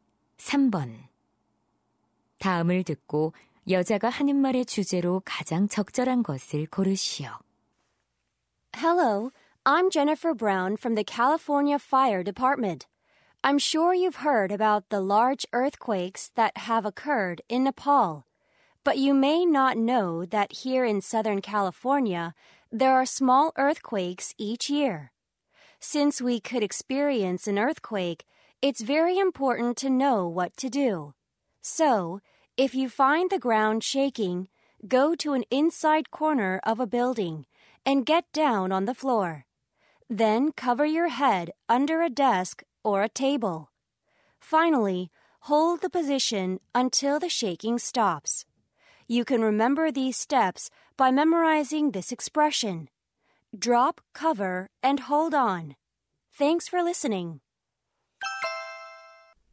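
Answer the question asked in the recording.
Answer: 지진 발생 시 행동 요령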